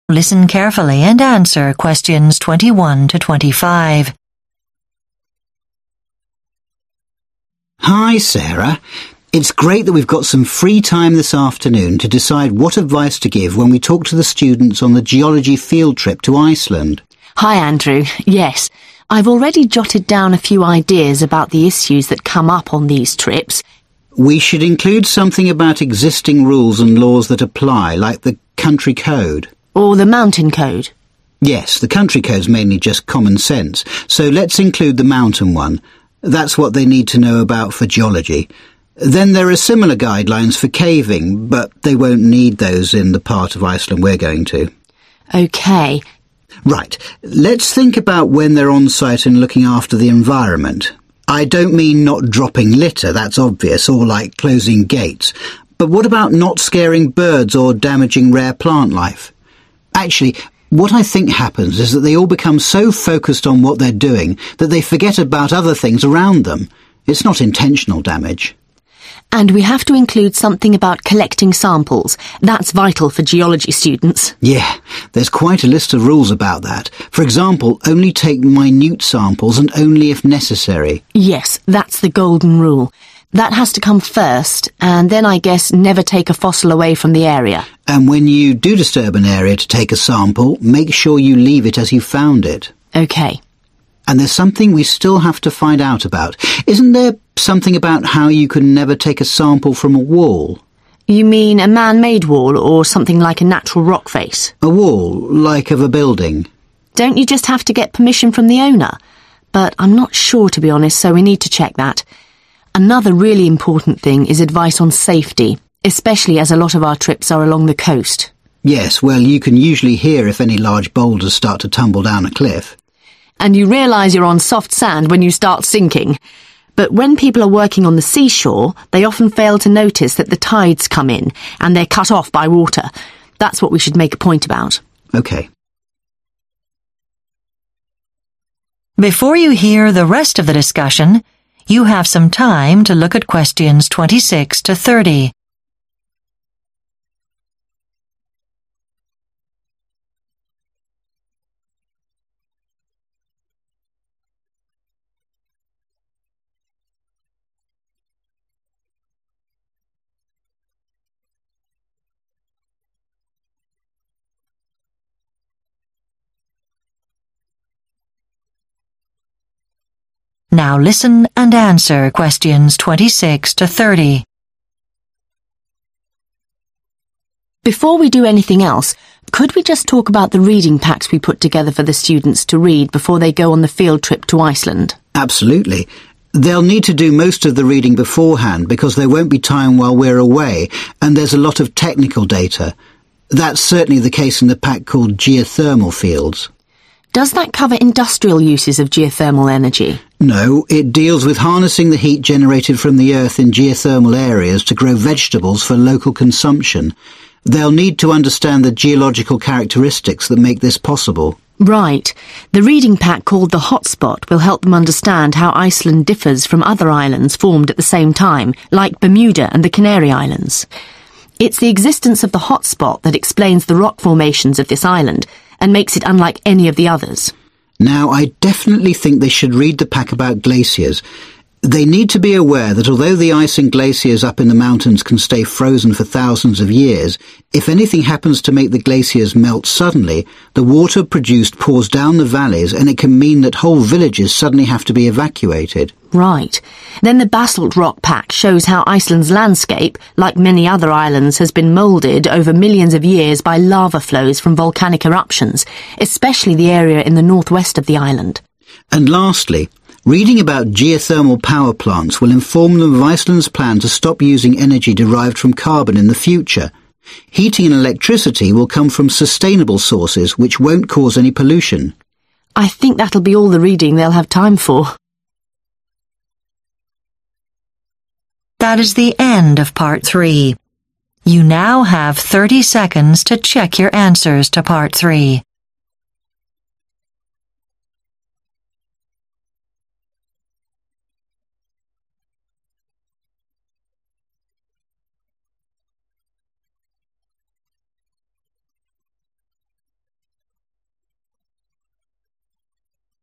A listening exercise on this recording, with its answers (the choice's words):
Choose the correct answer.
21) Why do Andrew and Sarah decide to mention the Mountain Code?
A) It is the most relevant to their field trip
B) It also applies to caves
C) It covers the whole country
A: It is the most relevant to their field trip

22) Andrew suggests some field trip participants harm the environment because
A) they fail to recognise rare species of plant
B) they don't realise how fragile the environment is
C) they get too absorbed in their tasks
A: they get too absorbed in their tasks

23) Which rule about taking samples is most important?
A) Leave the area in its natural state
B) Avoid removing fossils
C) Keep collecting to a minimum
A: Keep collecting to a minimum

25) What danger in coastal areas do they decide to emphasise?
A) falling rock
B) tidal movements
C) unstable sand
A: tidal movements

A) unique geological features of Iceland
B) replacement of fossil fuels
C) negative changes due to human activity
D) energy for agriculture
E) health risks of eruptions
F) risk of flooding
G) long-term effects of volcanoes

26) Geothermal Fields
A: energy for agriculture

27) The Hot Spot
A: unique geological features of Iceland

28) Glaciers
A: risk of flooding

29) Basalt Rock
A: long-term effects of volcanoes

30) Geothermal Power Plants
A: replacement of fossil fuels

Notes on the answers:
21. Yes, because it's the most relevant to our field trip, especially since we'll be hiking in the highlands.
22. Some participants might accidentally harm the environment because they get too absorbed in their tasks and don't pay attention to where they step.
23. When it comes to taking samples, the most important rule is to keep collecting to a minimum. We don't want to disturb the ecosystem.
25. For the coastal areas, we should emphasise the danger of tidal movements. The tide can come in very quickly.
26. used for heating greenhouses.
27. explains the island's formation.
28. glacial outburst floods are a major hazard.
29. basalt formations show volcanic history.
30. Iceland uses geothermal energy to replace oil and gas.